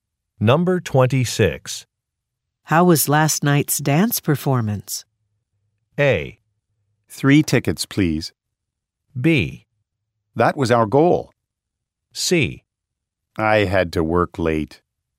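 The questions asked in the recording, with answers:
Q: How was last night's dance performance?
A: C: I had to work late.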